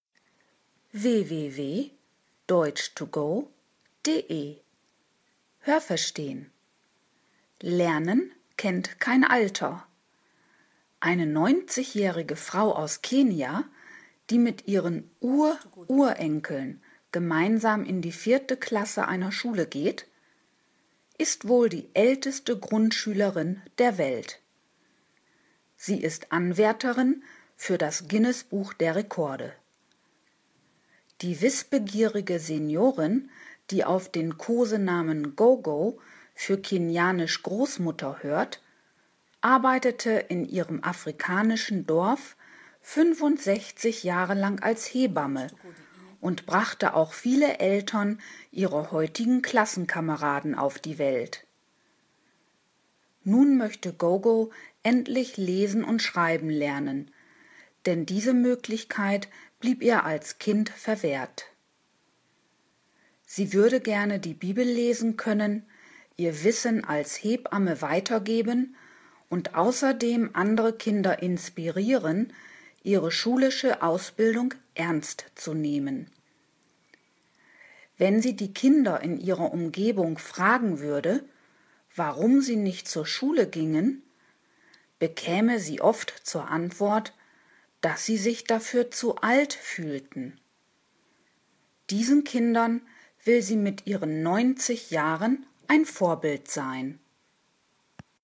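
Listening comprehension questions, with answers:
Haben Sie das gehört? Stimmt diese Aussage?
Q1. Eine 90-jährige kenianische Frau geht mit ihren Enkeln gemeinsam in eine Schule.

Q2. Die Kenianerin geht in die vierte Klasse der Grundschule.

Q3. Die 90-jährige Frau steht im Guinness-Buch der Rekorde.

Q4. Gogo arbeitete fast ein halbes Jahrhundert lang als Hebamme.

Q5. Als Hebamme half sie den Großmüttern vieler ihrer Klassenkameraden bei der Geburt.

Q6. Als Kind war es für Gogo nicht möglich, Lesen und Schreiben zu lernen.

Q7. Gerne würde die Seniorin ihre Kenntnisse als Hebamme weitergeben.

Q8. Gogo fragt die Eltern in ihrem Dorf, warum sie ihre Kinder nicht in die Schule schicken.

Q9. Die Kinder gehen nicht zur Schule, weil sie sich zu alt fühlen.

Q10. Die Kinder sind ein Vorbild für die alte Frau.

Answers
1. falsch
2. richtig
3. falsch
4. falsch
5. falsch
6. richtig
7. richtig
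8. falsch
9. richtig
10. falsch

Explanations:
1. Sie geht zusammen mit ihren Ururenkeln in die Schule.
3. Noch nicht. Sie ist Anwärterin für einen Eintrag dort.
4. Sie war sogar 65 Jahre lang in diesem Beruf tätig.
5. Sie brachte die Eltern vieler ihrer Klassenkameraden auf die Welt.
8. Sie fragt die Kinder in ihrer Umgebung, warum sie nicht zur Schule gehen.
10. Die 90-Jährige will mit ihrem Schulbesuch ein Vorbild für die Kinder sein.

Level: B (mittel)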